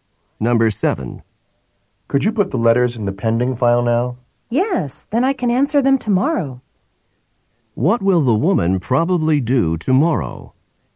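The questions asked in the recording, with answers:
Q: What will the woman probably do tomorrow?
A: Answer the letters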